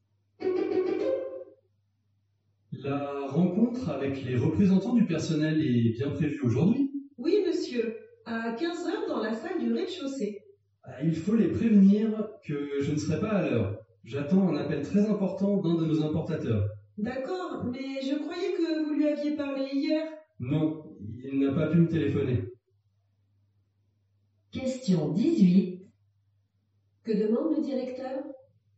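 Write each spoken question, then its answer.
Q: Que demande le directeur ?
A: De prévenir les représentants du personnel qu'il sera en retard.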